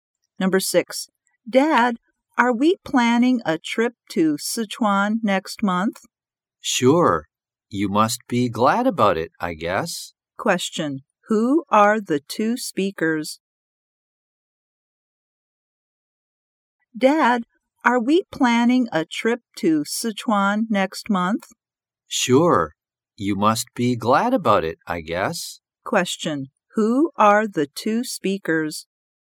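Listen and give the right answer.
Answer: A father and his child.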